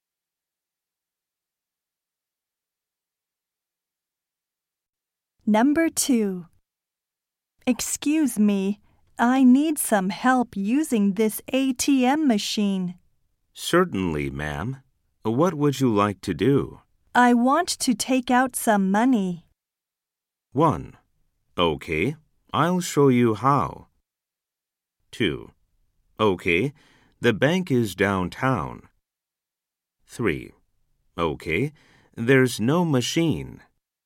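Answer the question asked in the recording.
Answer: 1: Okay, I'll show you how.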